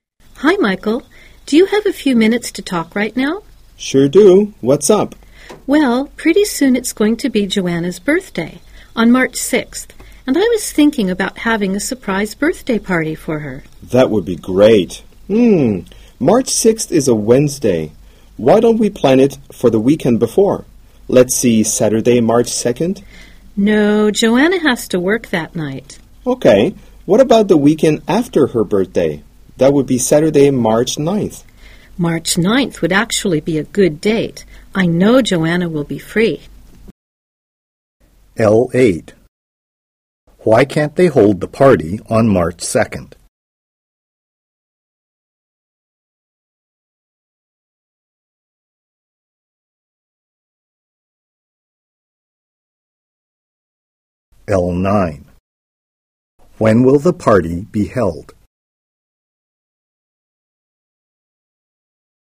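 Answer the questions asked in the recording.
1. Joanna has to work that night
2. Saturday, March 9th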